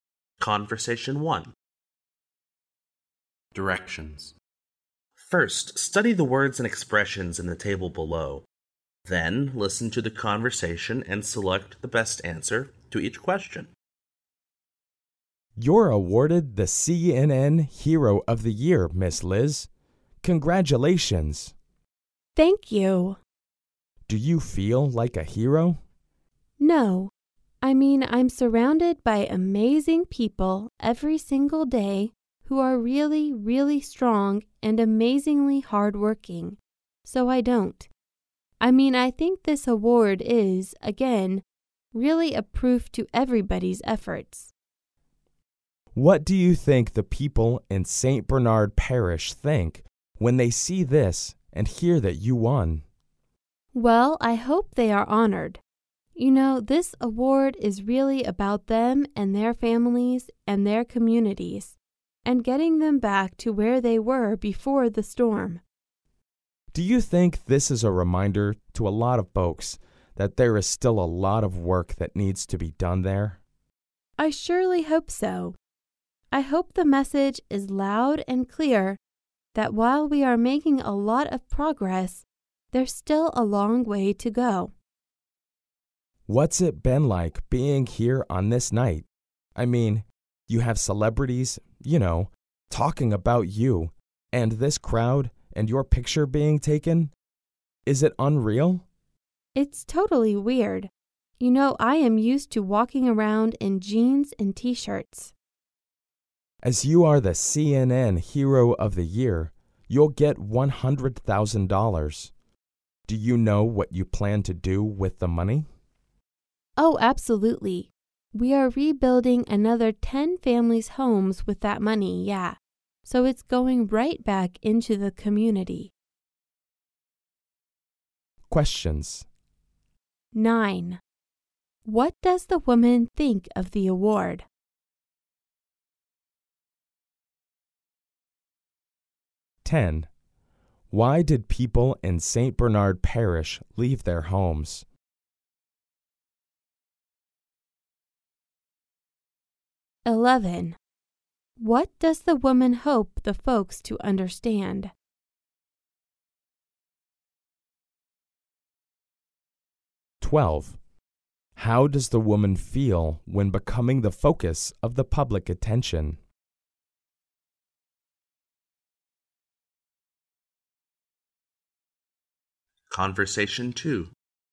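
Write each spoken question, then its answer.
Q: What does the woman think of the award?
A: It is proof of everybody's efforts, not just hers

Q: Why did people in St. Bernard Parish leave their homes?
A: Because of the storm

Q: What does the woman hope the folks to understand?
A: That there is still a long way to go and a lot of work to be done

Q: How does the woman feel when becoming the focus of the public attention?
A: She feels it is totally weird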